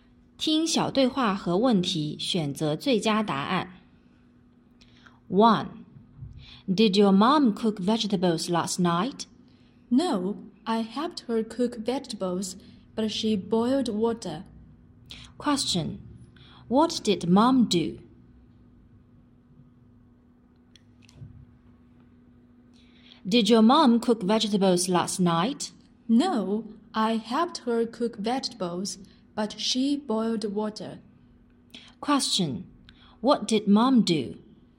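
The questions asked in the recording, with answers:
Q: What did mom do?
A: She boiled water.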